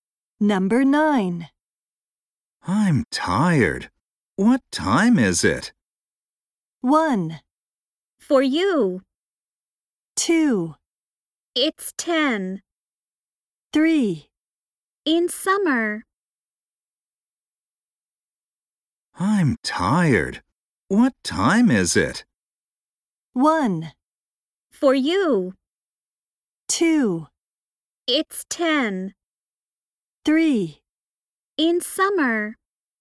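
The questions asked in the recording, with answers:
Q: I'm tired. What time is it?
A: 2: It's 10.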